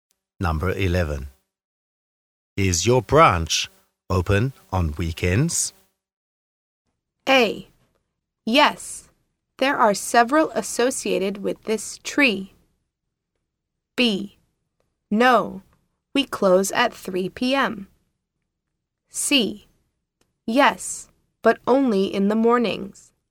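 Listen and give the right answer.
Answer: C: Yes, but only in the mornings.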